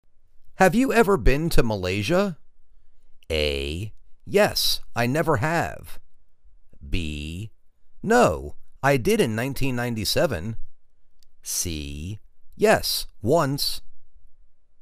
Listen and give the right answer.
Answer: Yes, once.